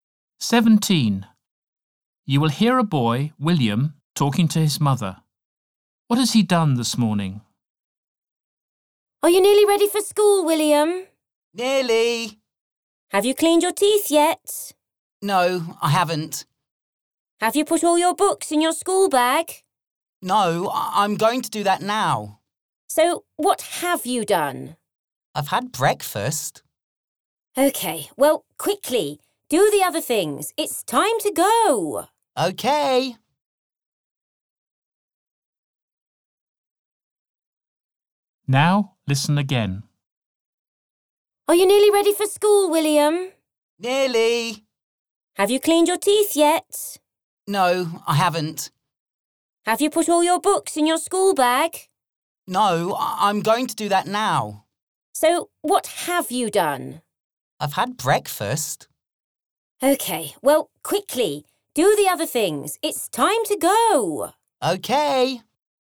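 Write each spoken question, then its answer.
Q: What has he done this morning?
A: had breakfast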